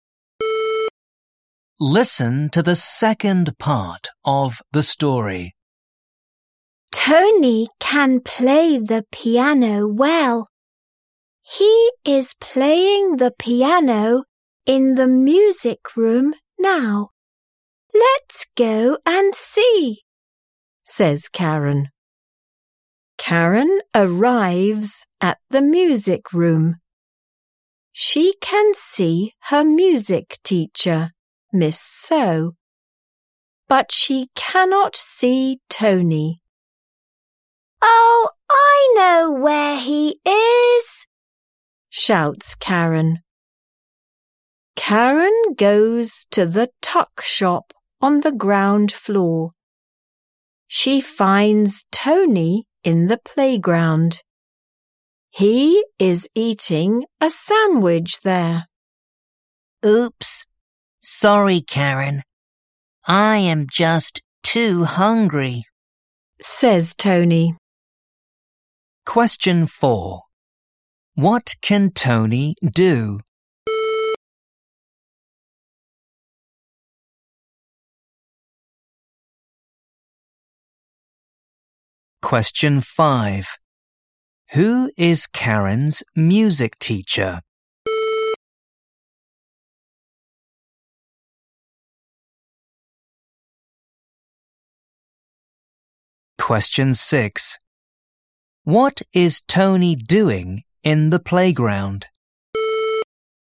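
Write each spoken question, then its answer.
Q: What can Tony do?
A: He can play the piano well.

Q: Who is Karen's music teacher?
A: Miss So

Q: What is Tony doing in the playground?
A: He is eating a sandwich.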